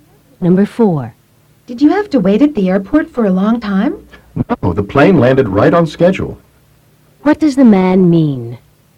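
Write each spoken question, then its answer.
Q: What does the man mean?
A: The plane arrived on time, so there was no long wait.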